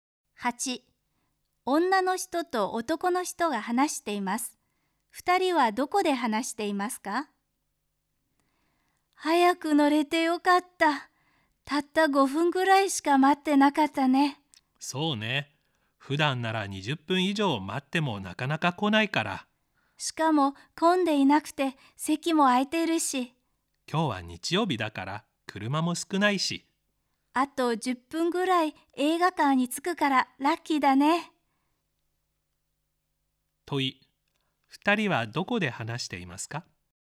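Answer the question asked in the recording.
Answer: バスの中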